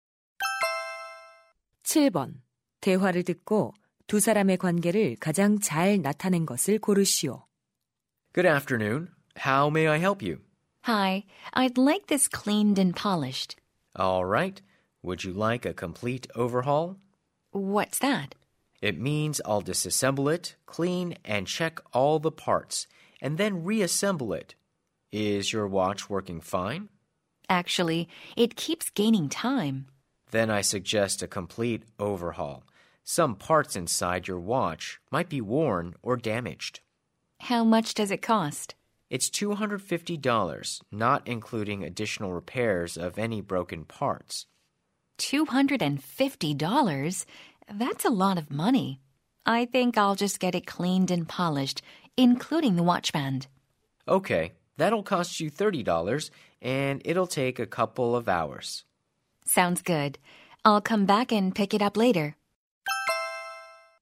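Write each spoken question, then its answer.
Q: 대화를 듣고 두 사람의 관계를 가장 잘 나타낸 것을 고르시오.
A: 시계 수리공 - 손님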